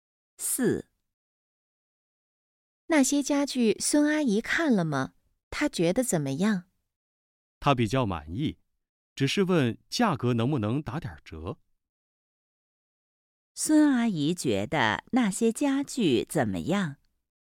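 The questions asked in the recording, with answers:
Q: 孙阿姨觉得那些家具怎么样?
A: 比较满意,但希望打折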